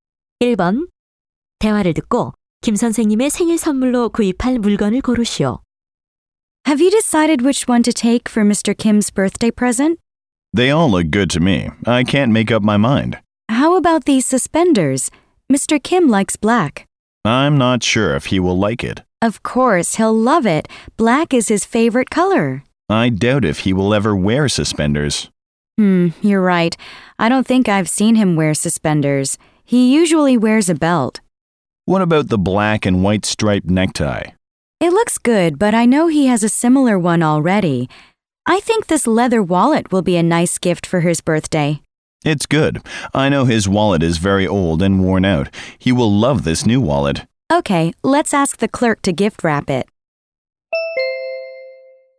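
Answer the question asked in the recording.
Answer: 가죽 지갑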